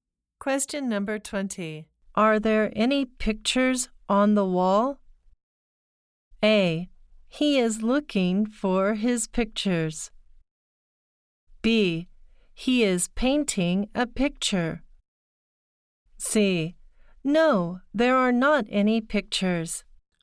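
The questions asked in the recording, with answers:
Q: Are there any pictures on the wall?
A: C: No, there are not any pictures.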